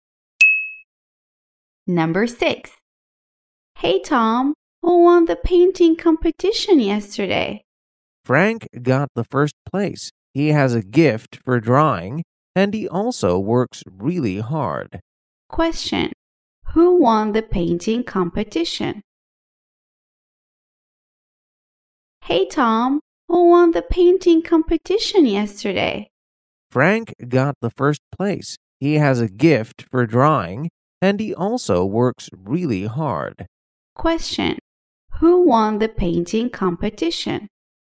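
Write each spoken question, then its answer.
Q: Question. Who won the painting competition?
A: Frank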